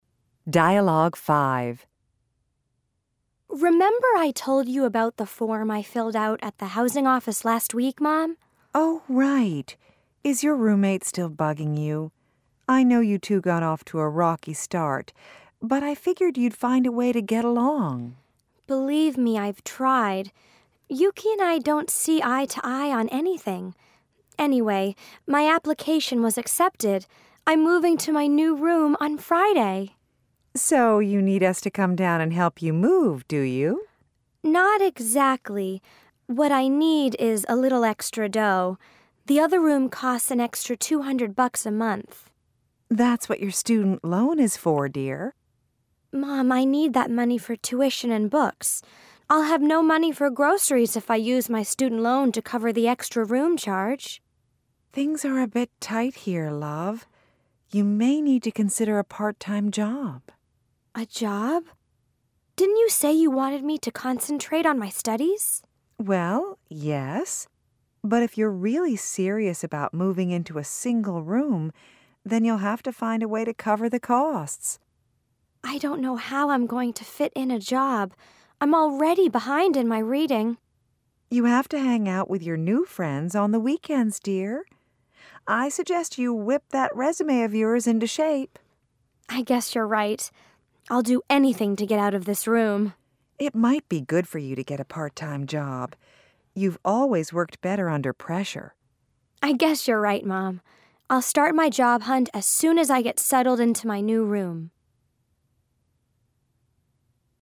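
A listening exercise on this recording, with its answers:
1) Have Yuki and Kate found a way to get along?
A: No, they don't see eye to eye on anything.

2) What does Kate's mom think Kate is going to ask for at first?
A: For them to come down and help her move.

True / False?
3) True or False? Kate's student loan will cover the extra costs of having a single room.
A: False

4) What does Kate's mom mean by "things are a bit tight around here"?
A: They don't have much extra money.

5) What suggestion does Kate's mom have for Kate in relation to affording the single room?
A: Get a part-time job.

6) What does Kate need to "whip into shape"?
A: Her resume.

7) According to Kate's mom, how does Kate work best?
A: Under pressure.

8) What does Kate agree to do?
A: Start a job hunt once she settles into her new room.

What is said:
Kate: Remember I told you about the form I filled out at the housing office last week, Mom?
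Mom: Oh, right. Is your roommate still bugging you? I know you two got off to a rocky start, but I figured you'd find a way to get along.
Kate: Believe me, I've tried. Yuki and I don't see eye to eye on anything. Anyway, my application was accepted. I'm moving to my new room on Friday.
Mom: So you need us to come down and help you move, do you?
Kate: Not exactly. What I need is a little extra dough. The other room costs an extra 200 bucks a month.
Mom: That's what your student loan is for, dear.
Kate: Mom, I need that money for tuition and books. I'll have no money for groceries if I use my student loan to cover the extra room charge.
Mom: Things are a bit tight here, love. You may need to consider a part-time job.
Kate: A job? Didn't you say you wanted me to concentrate on my studies?
Mom: Well, yes, but if you're really serious about moving into a single room, then you'll have to find a way to cover the costs.
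Kate: I don't know how I'm going to fit in a job. I'm already behind in my reading.
Mom: You have to hang out with your new friends on the weekends, dear. I suggest you whip that resume of yours into shape.
Kate: I guess you're right. I'll do anything to get out of this room.
Mom: It might be good for you to get a part-time job. You've always worked better under pressure.
I'll start my job hunt as soon as I get settled into my new room.

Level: Intermediate (B1)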